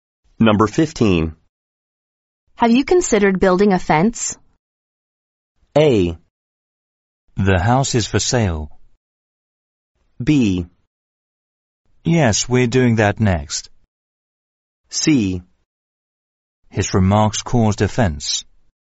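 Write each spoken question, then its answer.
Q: Have you considered building a fence?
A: B: Yes, we're doing that next.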